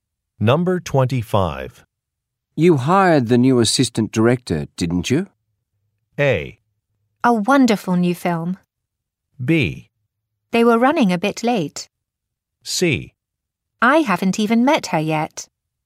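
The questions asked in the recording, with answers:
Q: You hired the new assistant director, didn't you?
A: C: I haven't even met her yet.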